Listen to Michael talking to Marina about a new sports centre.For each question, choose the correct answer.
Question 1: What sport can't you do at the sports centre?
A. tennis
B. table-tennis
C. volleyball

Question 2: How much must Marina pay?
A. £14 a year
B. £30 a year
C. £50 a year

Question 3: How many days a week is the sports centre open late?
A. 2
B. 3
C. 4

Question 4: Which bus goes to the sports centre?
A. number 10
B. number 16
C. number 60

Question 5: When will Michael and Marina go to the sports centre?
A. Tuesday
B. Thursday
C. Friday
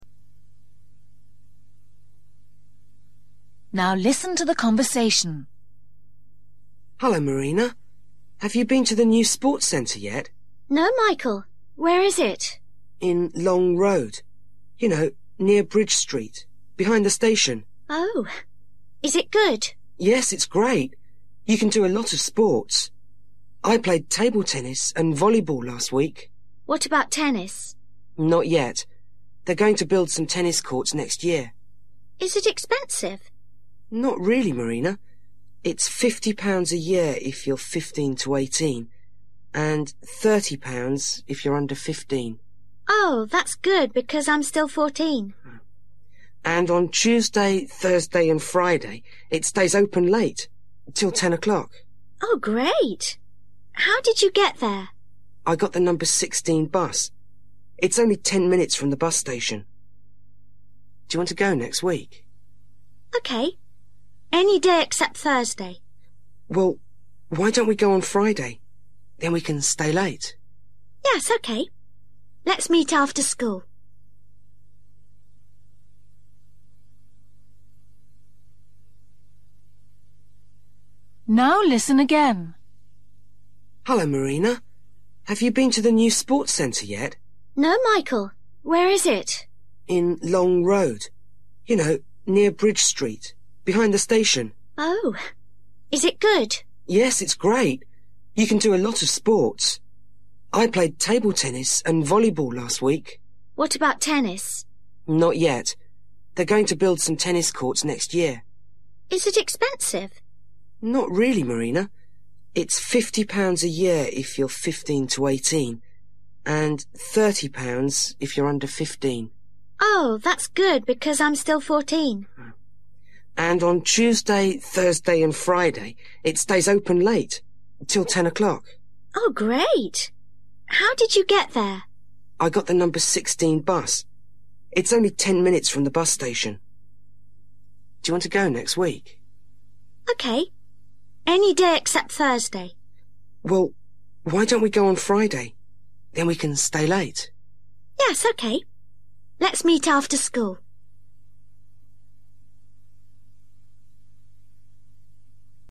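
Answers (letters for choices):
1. A
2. B
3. B
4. B
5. C

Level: Luyện nghe trình độ A2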